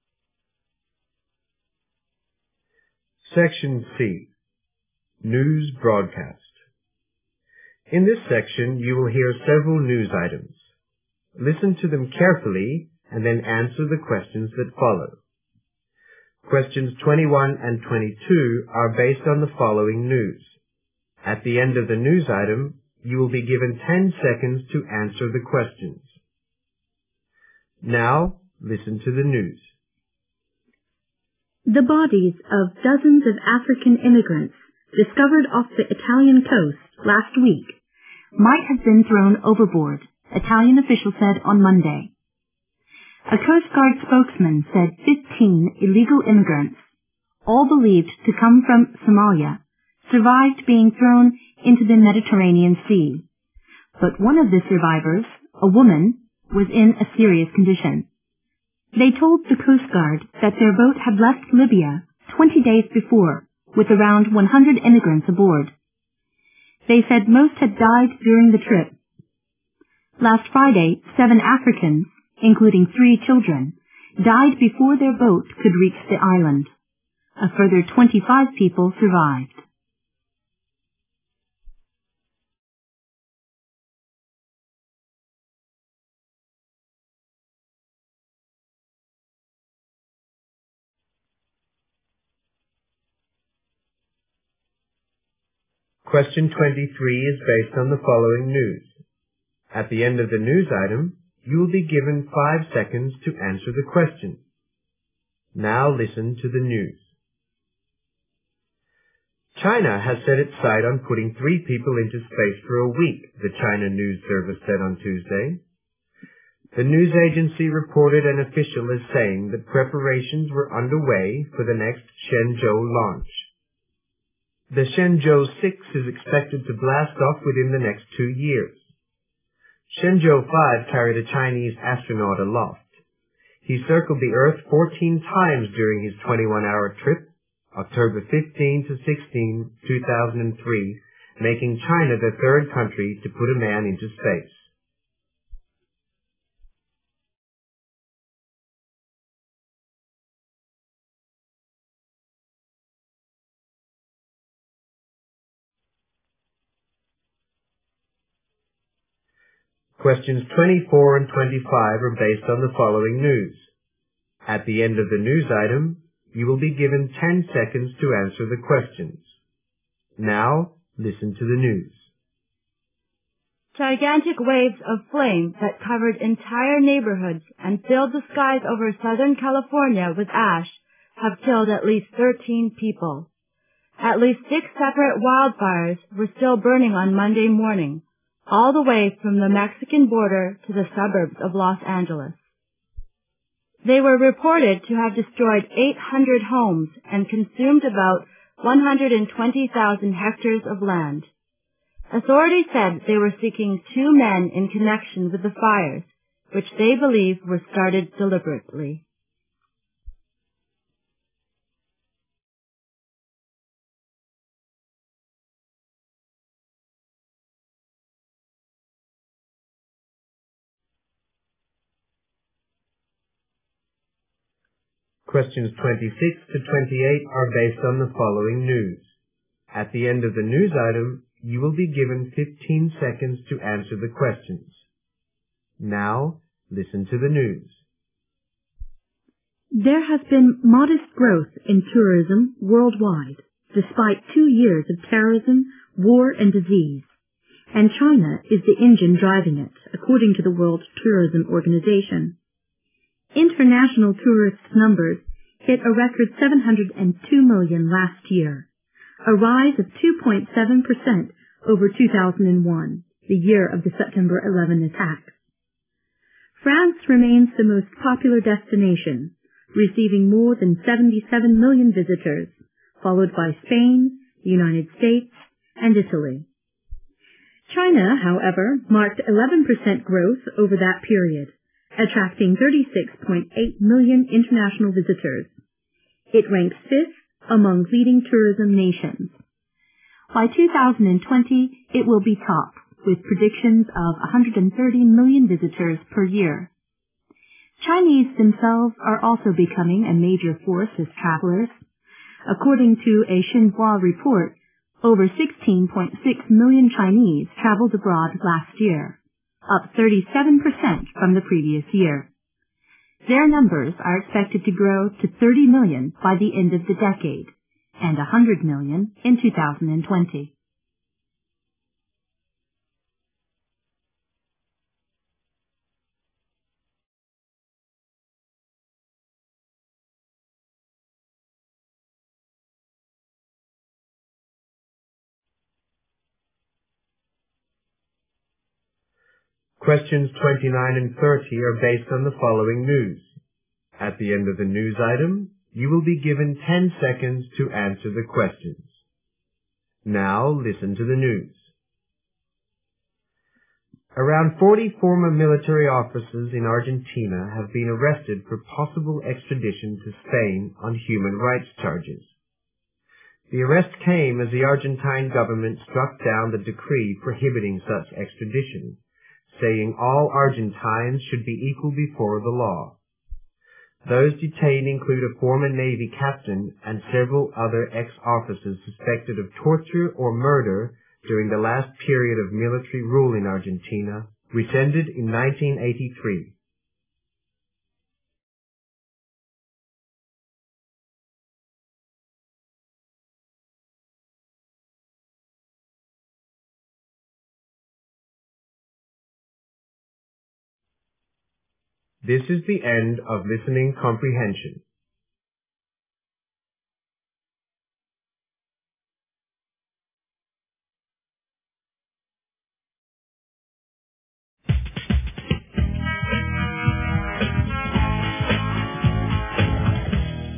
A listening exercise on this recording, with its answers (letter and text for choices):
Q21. How many of the emigrants died after being thrown into the sea?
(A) 15 of them.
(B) 3 of them.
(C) 100 of them.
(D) Dozens of them.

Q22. The illegal emigrants came from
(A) Italy.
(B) Africa.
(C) the Mediterranean region.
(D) places unknown.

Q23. What does the news item mainly report?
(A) China will send three people into space in a week.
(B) Three Chinese astronauts will spend a week in space.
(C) The Shenzhou VI will be launched next year.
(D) Shenzhou V circled the earth for two days.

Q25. The fires were thought to have been started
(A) purposefully.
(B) accidentally.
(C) on the Mexican border.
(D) in southern California.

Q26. ________ ranks second among leading tourism nations.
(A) France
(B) The United States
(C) Spain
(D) Italy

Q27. It is predicted that by 2020 China will receive _________ visitors.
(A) 77 million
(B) 130 million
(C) 36.8 million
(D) 100 million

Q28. According to a Xinhua report, last year saw a _________ per cent increase in the number of Chinese traveling abroad.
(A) 16.6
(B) 30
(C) 100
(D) 37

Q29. What would happen to the Argentine officers?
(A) They would be arrested by Spanish authorities.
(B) They would be tried in an Argentine court.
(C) They would be sent to Spain for trial.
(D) They would be tortured or murdered.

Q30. What accusation would the Argentine officers face?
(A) Violation of human rights.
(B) Involvement in illegal actions.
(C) Planning anti-government activities.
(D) Being part of the military rule.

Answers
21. (D) Dozens of them.
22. (B) Africa.
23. (B) Three Chinese astronauts will spend a week in space.
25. (A) purposefully.
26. (C) Spain
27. (B) 130 million
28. (D) 37
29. (C) They would be sent to Spain for trial.
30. (A) Violation of human rights.

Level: GRADE FOUR